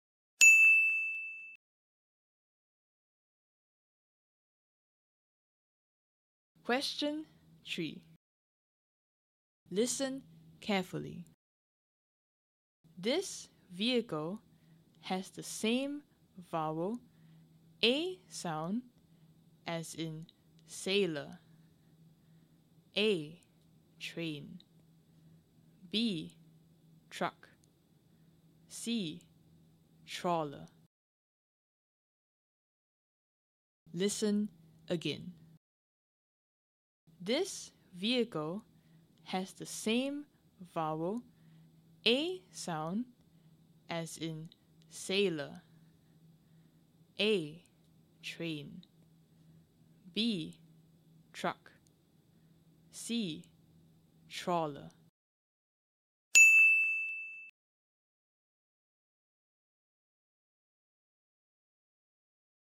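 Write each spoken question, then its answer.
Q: This vehicle has the same vowel, A sound, as in sailor.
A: A: train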